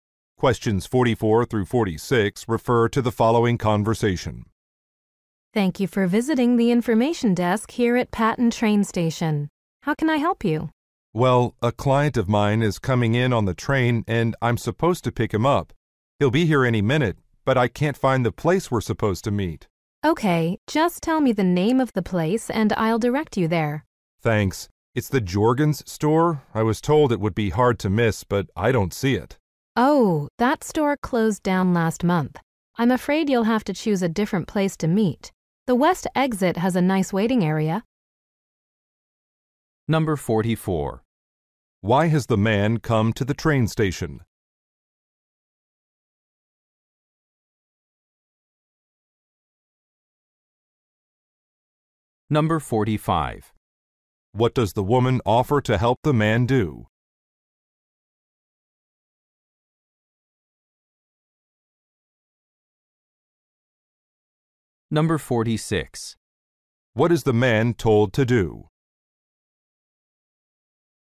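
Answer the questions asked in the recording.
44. To pick up a client.
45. Find a meeting place.
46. Choose a different place to meet.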